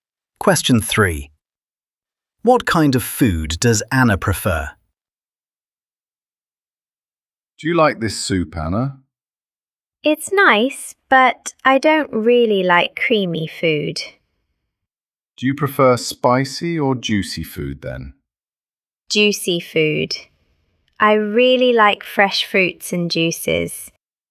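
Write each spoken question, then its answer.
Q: What kind of food does Anna prefer?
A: juicy food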